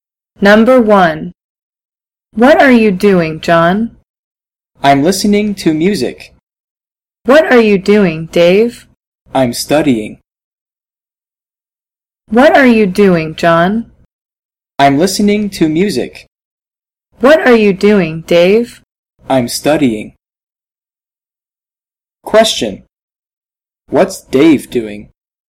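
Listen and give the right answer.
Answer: He's studying.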